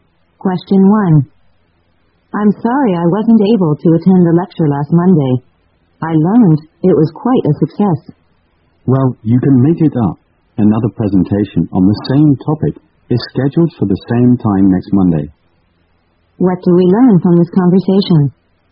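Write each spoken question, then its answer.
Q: What do we learn from this conversation?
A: Another presentation on the same topic will be held next Monday at the same time.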